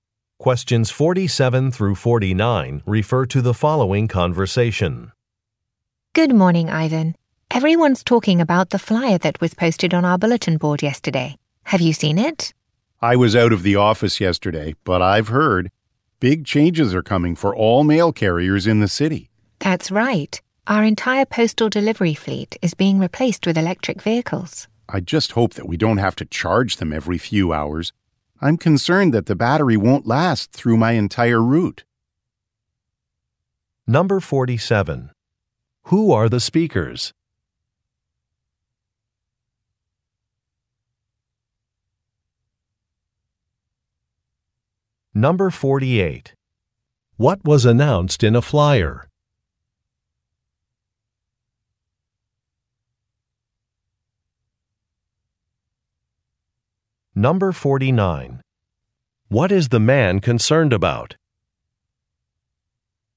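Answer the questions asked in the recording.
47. Mail carriers
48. The delivery fleet is being replaced with electric vehicles
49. The battery may not last through his route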